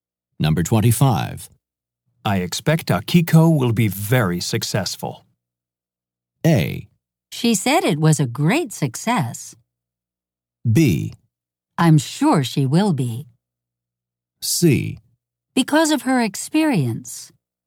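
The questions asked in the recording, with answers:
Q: I expect Akiko will be very successful.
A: B: I'm sure she will be.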